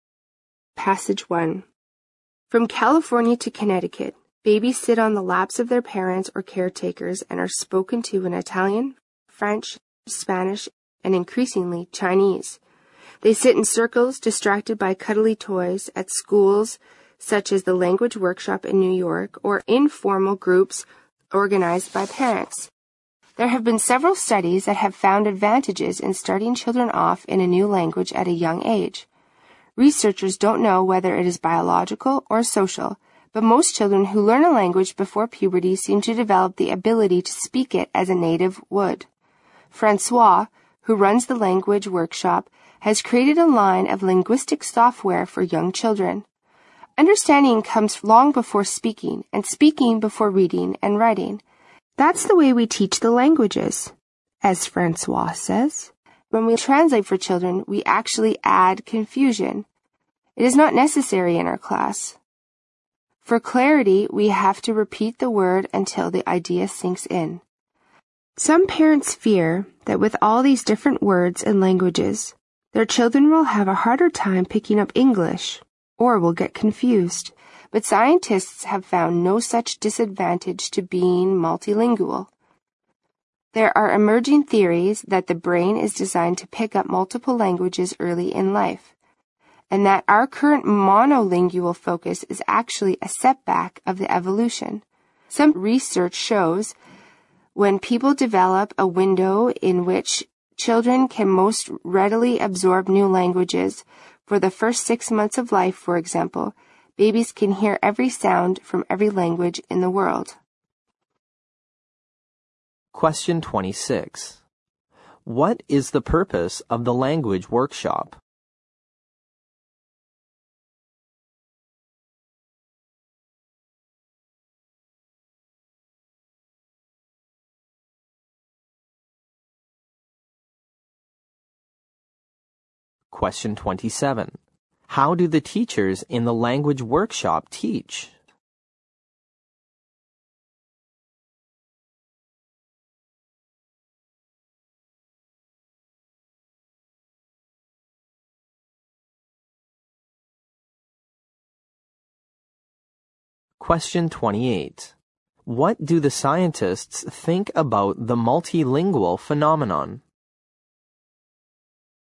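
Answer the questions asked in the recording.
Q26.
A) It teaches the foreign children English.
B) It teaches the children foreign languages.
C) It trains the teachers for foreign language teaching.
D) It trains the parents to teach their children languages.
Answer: B) It teaches the children foreign languages.
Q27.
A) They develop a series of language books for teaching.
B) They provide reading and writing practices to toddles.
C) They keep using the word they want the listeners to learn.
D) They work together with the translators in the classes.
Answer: C) They keep using the word they want the listeners to learn.
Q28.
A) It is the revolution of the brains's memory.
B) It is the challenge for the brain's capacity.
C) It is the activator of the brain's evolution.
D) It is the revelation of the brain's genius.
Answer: C) It is the activator of the brain's evolution.

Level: 六级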